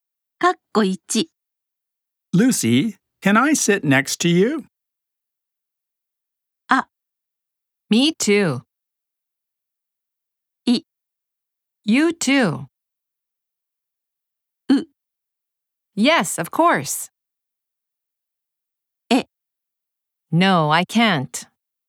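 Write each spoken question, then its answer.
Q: Lucy, can I sit next to you?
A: ウ: Yes, of course.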